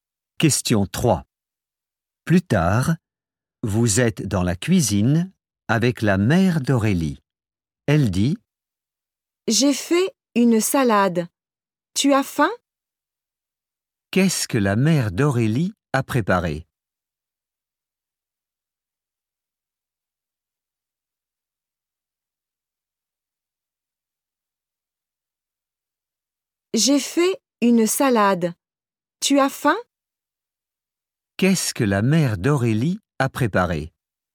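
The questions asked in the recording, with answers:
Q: Qu'est-ce que la mère d'Aurélie a préparé?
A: Une salade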